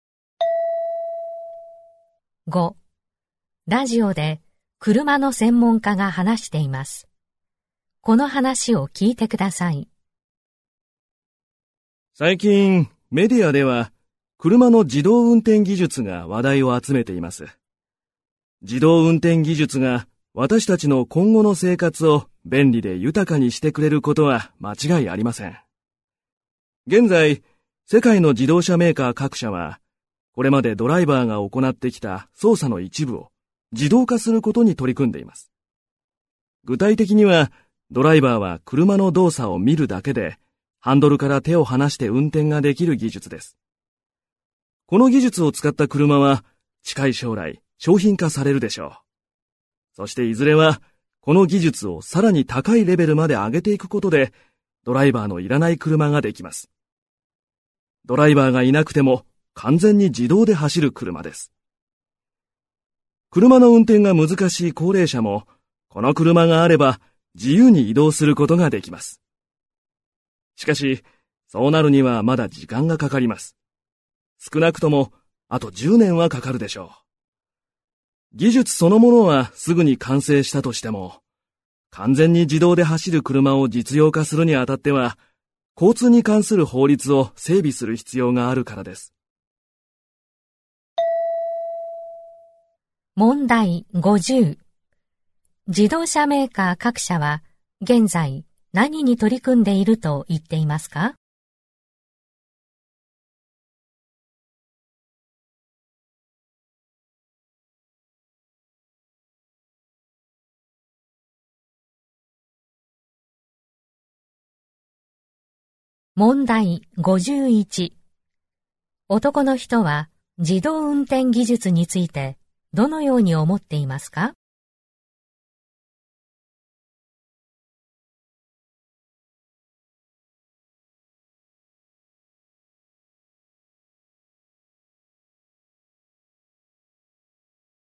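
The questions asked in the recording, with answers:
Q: 自動車メーカー各社は現在何に取り組んでいると言っていますか?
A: ドライバーが行ってきた操作の一部を自動化すること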